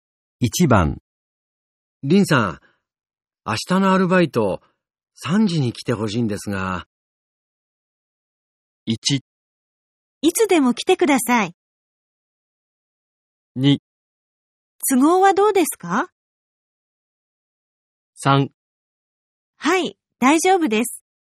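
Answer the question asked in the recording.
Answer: 3: はい、大丈夫です。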